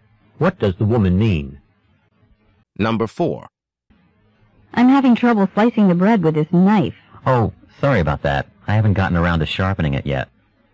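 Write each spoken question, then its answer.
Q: What can be inferred about the knife?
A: It is dull and needs sharpening.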